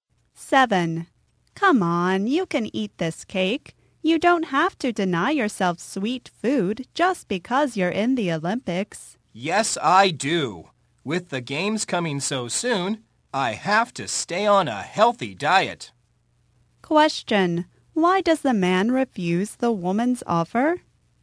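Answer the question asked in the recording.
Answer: He must stay on a healthy diet before the games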